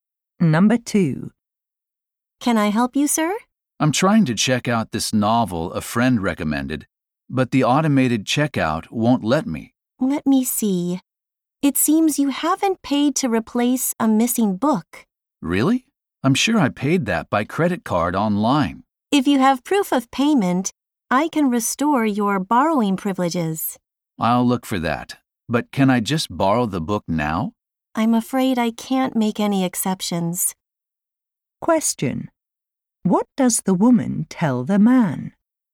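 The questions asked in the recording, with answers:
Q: What does the woman tell the man?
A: He cannot borrow the book until he shows proof he paid for the missing book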